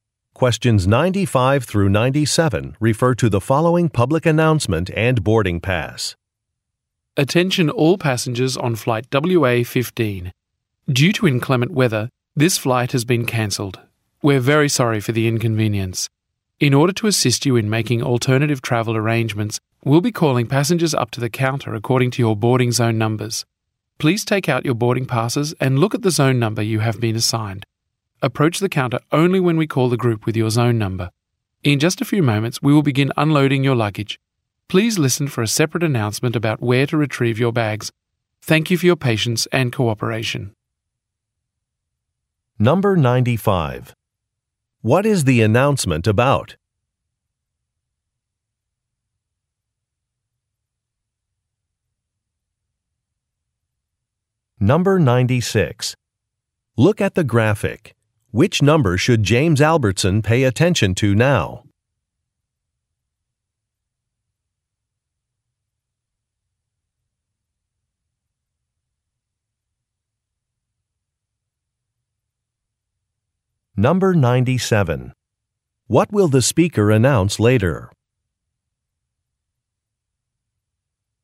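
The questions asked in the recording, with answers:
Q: What is the announcement about?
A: A cancelled flight

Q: What will the speaker announce later?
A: Where to retrieve luggage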